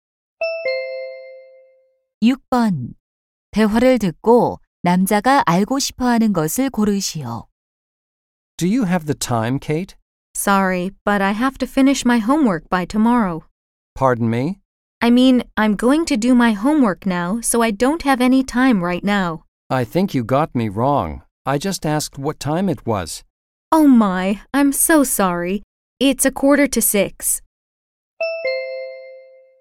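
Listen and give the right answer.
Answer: 현재 시각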